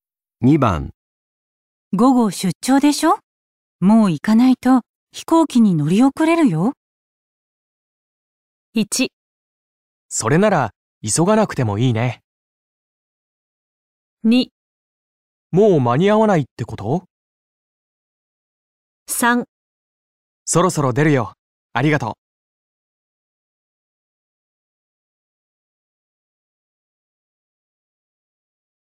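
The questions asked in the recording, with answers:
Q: 午後出張でしょ?もう行かないと飛行機に乗り遅れるよ。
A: 3: そろそろ出るよ。ありがとう。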